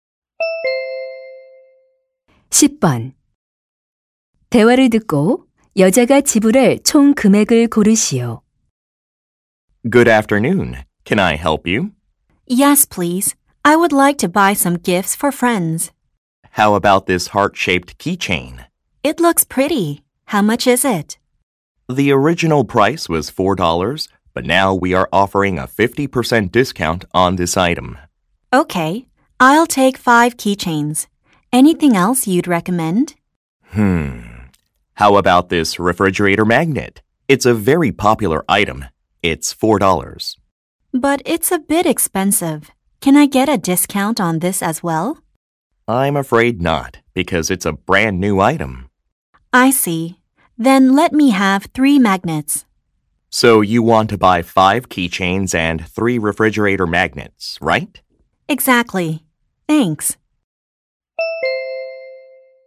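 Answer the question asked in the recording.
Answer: 22달러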